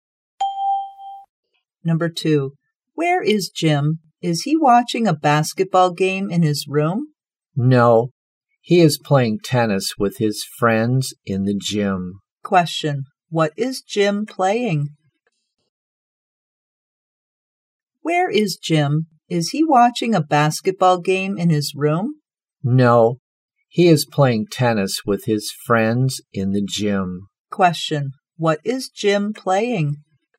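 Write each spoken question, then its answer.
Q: what is Jim playing?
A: Tennis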